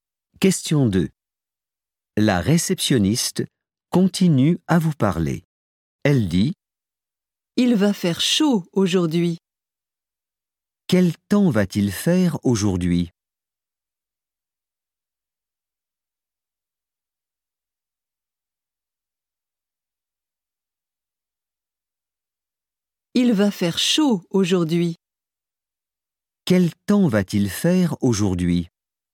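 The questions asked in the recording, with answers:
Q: Quel temps va-t-il faire aujourd'hui ?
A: Il va faire chaud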